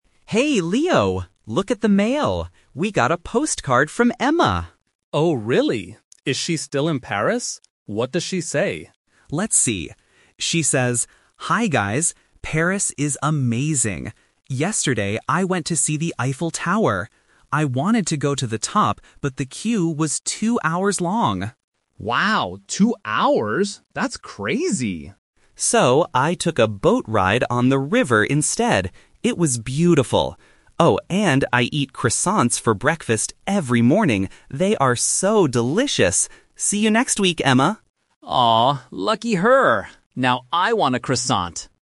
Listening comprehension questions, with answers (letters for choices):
Listen to two roommates, Mark and Leo, talking about a postcard. Choose the correct answer (A, B, or C) for each question.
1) Why didn't Emma go to the top of the Eiffel Tower?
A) Because she was scared of heights.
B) Because she didn't want to wait in a very long line.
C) Because it was closed for the day.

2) What did Emma actually do yesterday?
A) She climbed the Eiffel Tower.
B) She learned how to make croissants.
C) She went on a boat tour.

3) What does Emma say about her breakfast?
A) She eats croissants every morning.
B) She eats at a very expensive restaurant.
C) She usually skips breakfast.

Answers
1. B
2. C
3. A

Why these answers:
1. Mark reads that Emma wanted to go to the top, "but the queue was two hours long!" Option (B) paraphrases this correctly ("queue" = "line"). Option (A) and (C) are plausible reasons in real life, but they are not mentioned in the postcard.
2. This is the "Twist". Emma wanted to go up the tower, but she says, "So, I took a boat ride on the river instead." Option (C) is the correct action. Option (A) is a trap because the Eiffel Tower is mentioned, but she didn't go up. Option (B) is a trap; she eats croissants, but she doesn't make them.
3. Mark reads, "I eat croissants for breakfast every morning." Option (A) is the exact match. Option (B) is a trap; she says the croissants are delicious, but doesn't mention expensive restaurants. Option (C) is the opposite of the truth.

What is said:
Mark: Hey, Leo! Look at the mail. We got a postcard from Emma.
Leo: Oh, really? Is she still in Paris? What does she say?
Mark: Let's see... She says, 'Hi guys, Paris is amazing! Yesterday, I went to see the Eiffel Tower. I wanted to go to the top, but the queue was two hours long!'
Leo: Wow, two hours? That's crazy.
Mark: 'So, I took a boat ride on the river instead. It was beautiful. Oh, and I eat croissants for breakfast every morning. They are so delicious! See you next week, Emma.'
Leo: Aww, lucky her. Now I want a croissant.